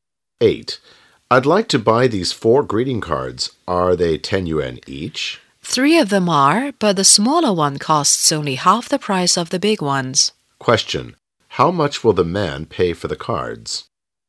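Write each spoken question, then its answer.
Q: How much will the man pay for the cards?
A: 35 yuan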